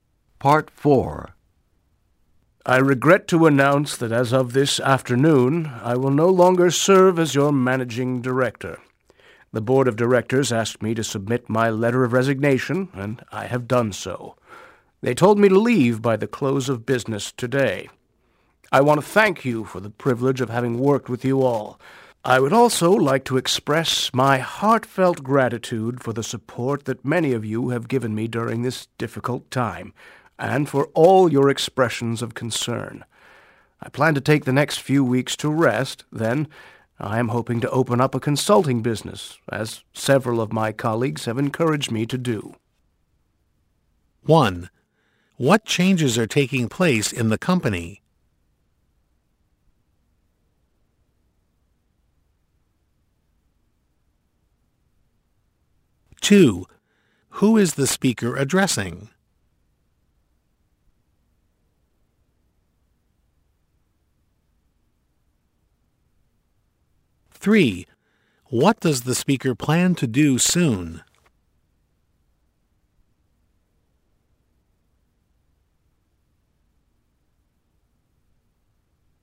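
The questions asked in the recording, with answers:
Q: What changes are taking place in the company?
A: The managing director is resigning

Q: Who is the speaker addressing?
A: The company's staff

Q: What does the speaker plan to do soon?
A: Rest for a few weeks, then open a consulting business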